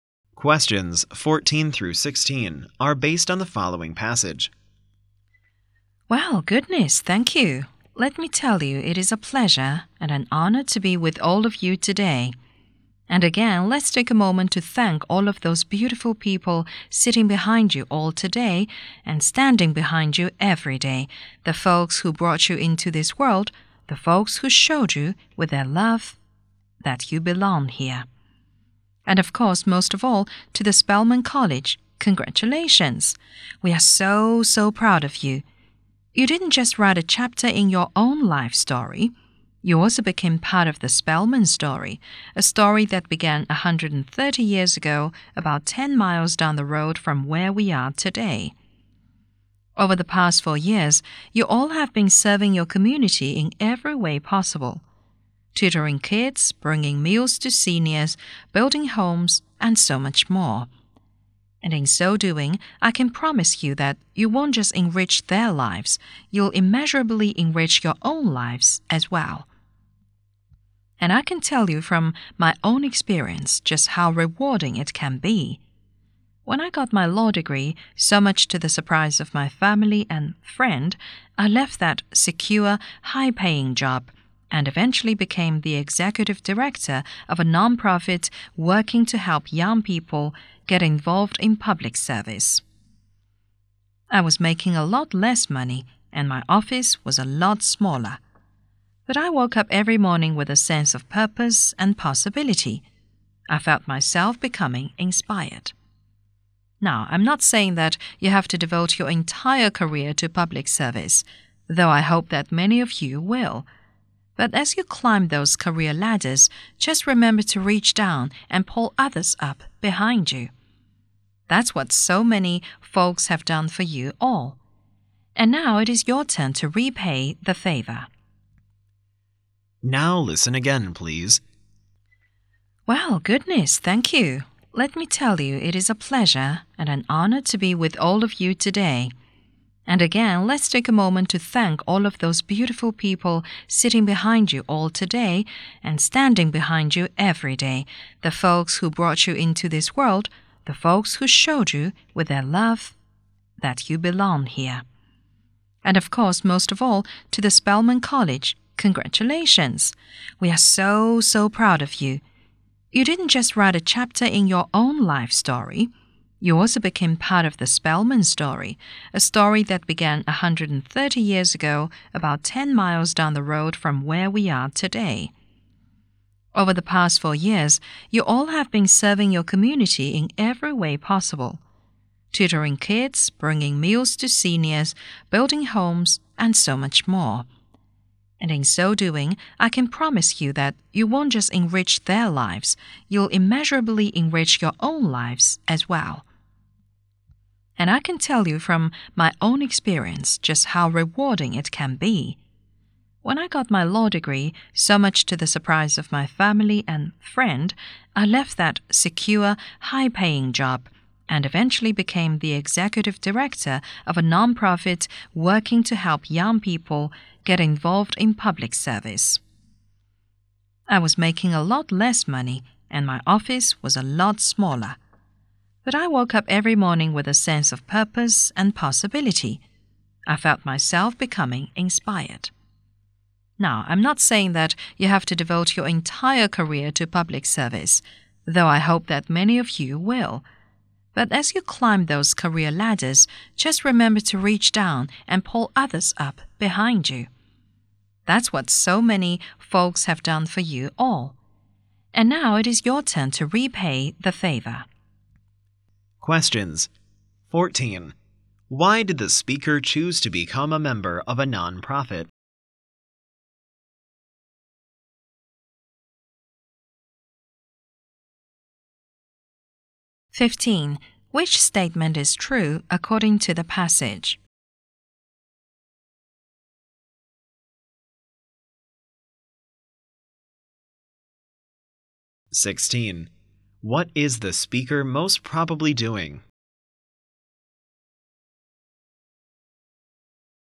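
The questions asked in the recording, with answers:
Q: What is the speaker most probably doing?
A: Giving a graduation speech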